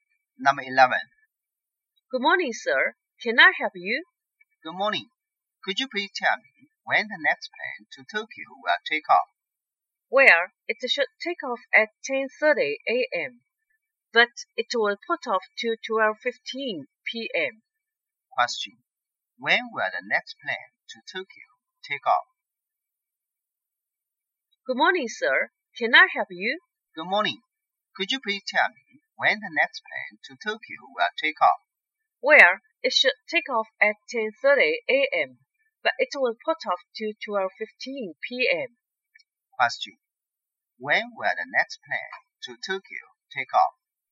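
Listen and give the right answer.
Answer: At 12:15 p.m.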